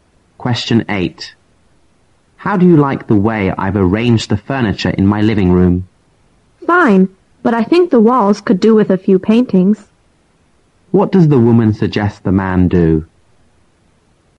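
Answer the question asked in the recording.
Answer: Hang some paintings on the walls.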